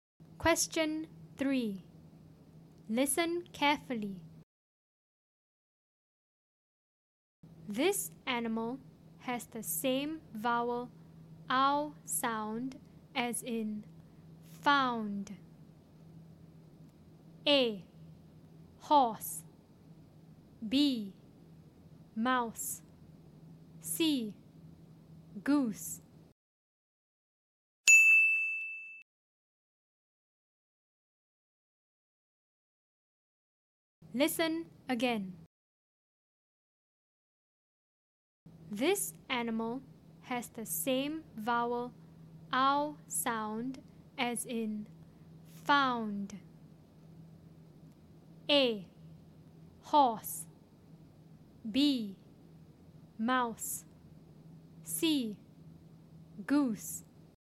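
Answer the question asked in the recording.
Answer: B: mouse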